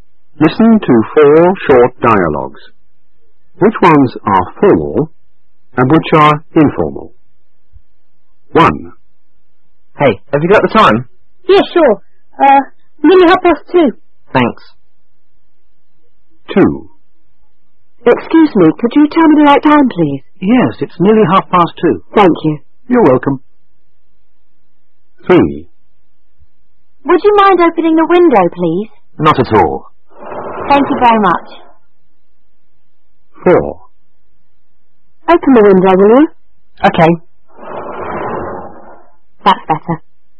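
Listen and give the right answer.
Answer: Dialogues 2 and 3 are formal; dialogues 1 and 4 are informal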